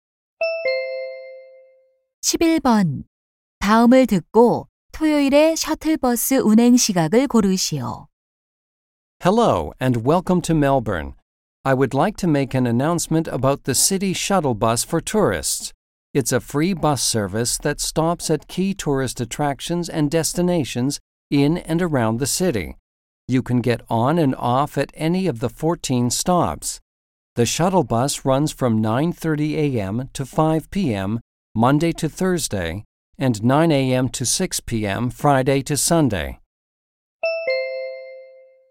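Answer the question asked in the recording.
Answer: 오전 9시부터 오후 6시까지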